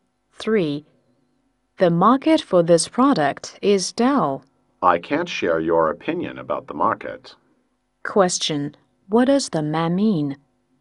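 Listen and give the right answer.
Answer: He doesn't agree that the market for the product is dull.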